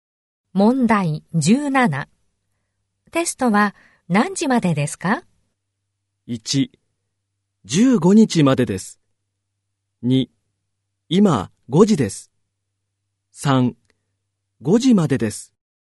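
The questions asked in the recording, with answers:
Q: テストは何時までですか。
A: 3: 5時までです。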